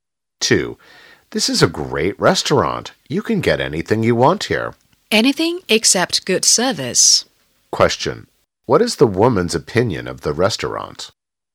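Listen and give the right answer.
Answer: The service is poor.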